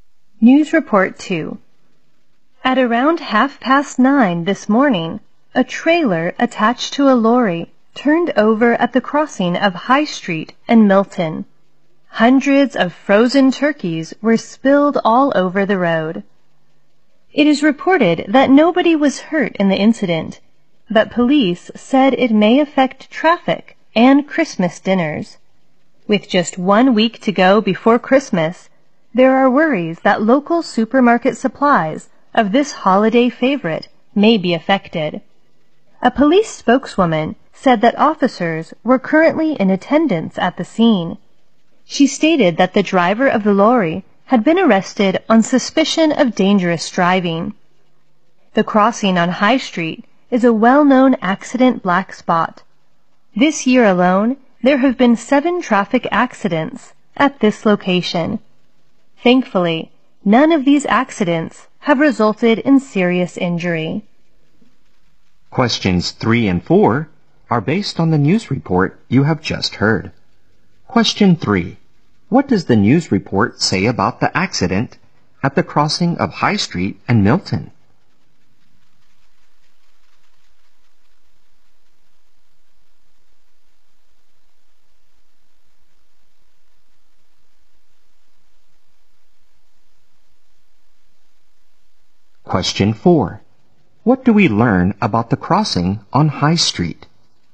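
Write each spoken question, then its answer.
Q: What do we learn about the crossing on High Street?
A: It is a well-known accident black spot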